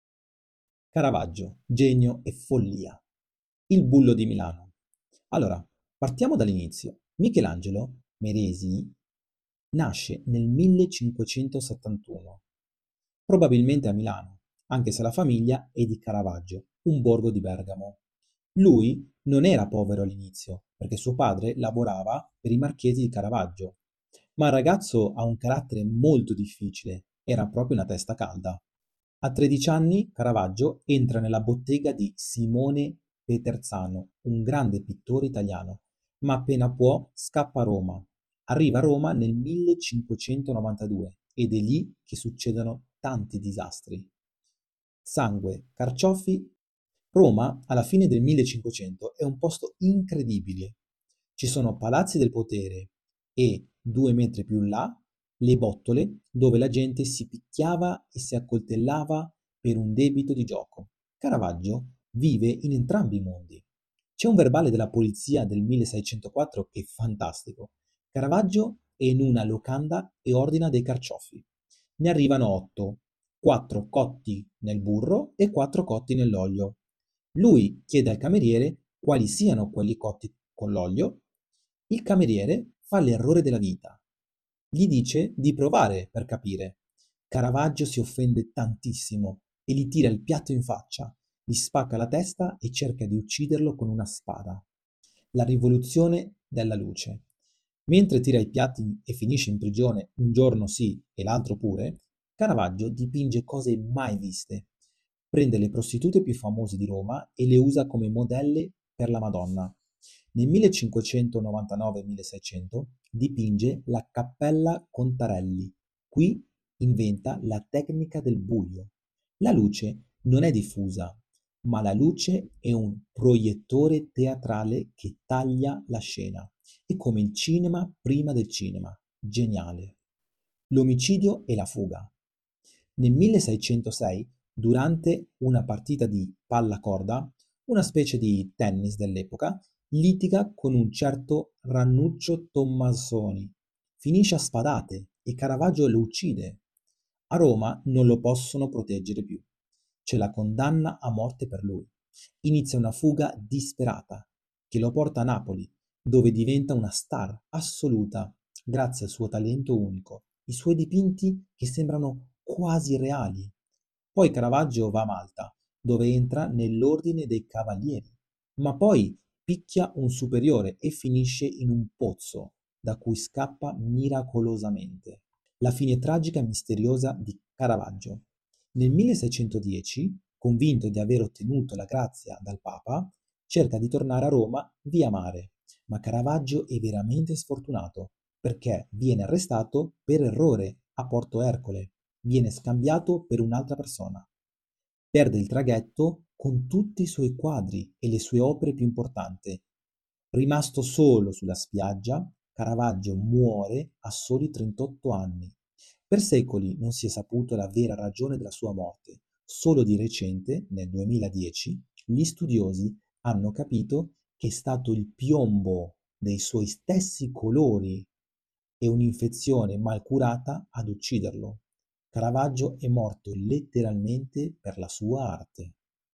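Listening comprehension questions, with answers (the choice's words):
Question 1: Dove è nato Michelangelo Merisi detto Caravaggio?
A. Roma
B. Milano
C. Napoli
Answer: Milano

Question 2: Presso quale maestro entra a bottega Caravaggio a soli 13 anni per imparare a dipingere?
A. Simone Peterzano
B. Leonardo da Vinci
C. Ranuccio Tomassoni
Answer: Simone Peterzano

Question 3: Perché Caravaggio ha aggredito un cameriere con un piatto di carciofi nel 1604?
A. Perché i carciofi erano crudi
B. Perché il cameriere gli rispose in modo maleducato di provare i carciofi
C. Perché non c'era abbastanza burro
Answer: Perché il cameriere gli rispose in modo maleducato di provare i carciofi

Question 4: Quale "rivoluzione" tecnica ha introdotto Caravaggio nella pittura?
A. L'uso di colori pastello e sfumati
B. Una luce diffusa che illumina tutto il quadro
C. Una luce teatrale e direzionale che taglia il buio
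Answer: Una luce teatrale e direzionale che taglia il buio

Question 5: Chi usava spesso Caravaggio come modelle per dipingere le figure sacre (come la Madonna)?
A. Nobildonne romane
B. Le sue sorelle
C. Le prostitute di Roma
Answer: Le prostitute di Roma

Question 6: Cosa accadde durante la famosa partita a pallacorda nel 1606?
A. Caravaggio fu nominato Cavaliere di Malta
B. Caravaggio vinse un torneo prestigioso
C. Caravaggio uccise Ranuccio Tomassoni durante una lite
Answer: Caravaggio uccise Ranuccio Tomassoni durante una lite

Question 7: Cosa successe a Caravaggio durante il suo soggiorno a Malta?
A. Fu arrestato per aver picchiato un superiore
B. Aprì una scuola di pittura per i cavalieri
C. Decise di farsi frate e abbandonare la pittura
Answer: Fu arrestato per aver picchiato un superiore

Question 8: Perché Caravaggio si trovava a Porto Ercole nel 1610?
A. Per andare in vacanza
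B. Per fuggire dai Cavalieri di Malta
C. Perché stava cercando di tornare a Roma per ricevere la grazia del Papa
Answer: Perché stava cercando di tornare a Roma per ricevere la grazia del Papa

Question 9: Cosa ha perso Caravaggio poco prima di morire, rimanendo solo sulla spiaggia?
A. La sua spada preferita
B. Il traghetto con tutti i suoi quadri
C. Il documento originale della grazia papale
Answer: Il traghetto con tutti i suoi quadri

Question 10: Secondo gli studi del 2010, qual è stata la causa principale della sua morte?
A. Un colpo di spada in un duello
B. Un'infezione e l'avvelenamento causato dal piombo dei suoi colori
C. È annegato nel mare di Porto Ercole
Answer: Un'infezione e l'avvelenamento causato dal piombo dei suoi colori

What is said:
Il "Bullo" di Milano
Michelangelo Merisi nasce nel 1571, probabilmente a Milano, anche se la famiglia è di Caravaggio, un borgo di Bergamo. 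Lui non era povero all`inizio perche' suo padre lavora per i marchesi di Caravaggio. Ma il ragazzo ha un carattere molto difficile era proprio una testa calda. A 13 anni Caravaggio entra nella bottega di Simone Peterzano un grande pittore italiano, ma appena può scappa a Roma. Arriva a Roma nel 1592, ed è lì che succedono tanti disastri.
Sangue & Carciofi
Roma alla fine del 1500 è un posto incredibile: ci sono i palazzi del potere e, due metri più in là, le bettole dove la gente si picchiava e si accoltellava per un debito di gioco. Caravaggio vive in entrambi i mondi. C'è un verbale della polizia del 1604 che è fantastico. Caravaggio è in una locanda e ordina dei carciofi. Ne arrivano otto: quattro cotti nel burro e quattro nell'olio. Lui chiede al cameriere quali siano quelli cotti con l`olio. Il cameriere fa l'errore della vita: gli dice di provare per capirlo, Caravaggio si offende tantissimo e gli tira il piatto in faccia, gli spacca la testa e cerca di ucciderlo con una spada.
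La Rivoluzione della Luce
Mentre tira piatti e finisce in prigione un giorno sì e l'altro pure, Caravaggio dipinge cose mai viste. Prende le prostitute più famose di Roma e le usa come modelle per la Madonna. Nel 1599-1600: Dipinge la Cappella Contarelli. Qui inventa la tecnica del "buio". La luce non è diffusa, ma la luce è un proiettore teatrale che taglia la scena. È come il cinema prima del cinema, geniale...
L'Omicidio e la Fuga
Nel 1606 durantee una partita di pallacorda (una specie di tennis dell'epoca), litiga con un certo Ranuccio Tomassoni. Finisce a spadate e Caravaggio lo uccide. A Roma non lo possono proteggere più: c'è la condanna a morte per lui. Inizia una fuga disperata che lo porta a Napoli: dove diventa una star assoluta grazie al suo talento unico, i suoi dipinti che sembrano quasi reali. Poi Caravaggio va a Malta: dove entra nell'Ordine dei Cavalieri, ma poi picchia un superiore e finisce in un pozzo, da cui scappa miracolosamente.
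La Fine Tragica e Misteriosa di Caravaggio
Nel 1610, convinto di aver ottenuto la grazia dal Papa, cerca di tornare a Roma via mare. Ma Caravaggio e' veramente sfortunato perche' viene arrestato per errore a Porto Ercole, viene scambiato per un'altra persona. Perde il traghetto con tutti i suoi quadri e le sue opere piu' importanti, rimasto solo sulla spiaggia. Caravaggio muore a soli 38 anni. Per secoli non si è saputo la vera ragione della sua morte, solo di recente, nel 2010, gli studiosi hanno capito che e' stato il piombo dei suoi stessi colori e un'infezione mal curata ad ucciderlo. Caravaggio e' morto letteralmente per la sua arte.
Caravaggio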